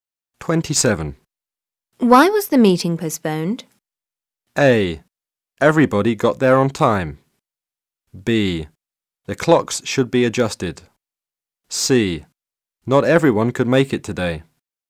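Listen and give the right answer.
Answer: C: Not everyone could make it today.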